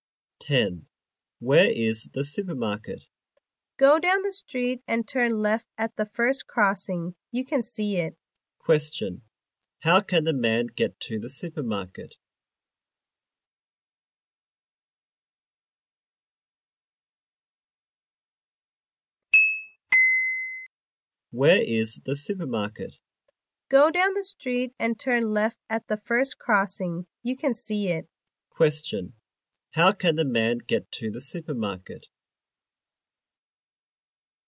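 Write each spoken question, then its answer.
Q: Question, how can the man get to the supermarket?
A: Go down the street and turn left at the first crossing.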